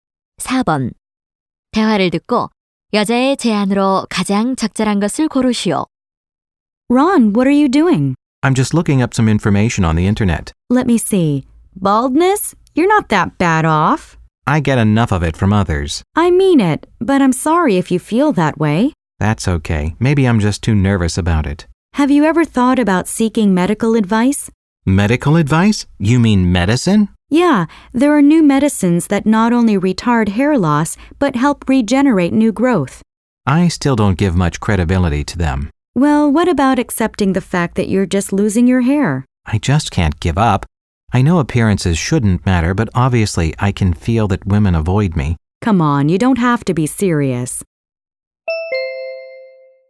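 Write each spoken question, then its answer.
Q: 대화를 듣고 여자의 제안으로 가장 적절한 것을 고르시오.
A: 탈모 치료를 위해 의학적 조언(약)을 구하라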